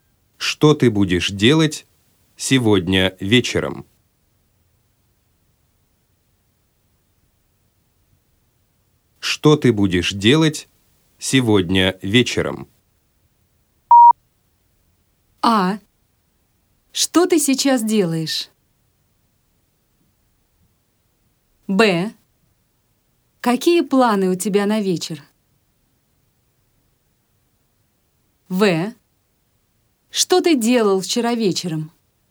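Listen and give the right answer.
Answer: Б: Какие планы у тебя на вечер?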